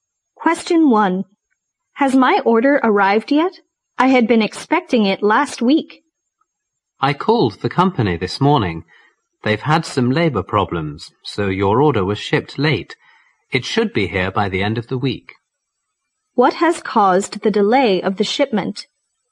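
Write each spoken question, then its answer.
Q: What has caused the delay of the shipment?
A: Labour problems at the company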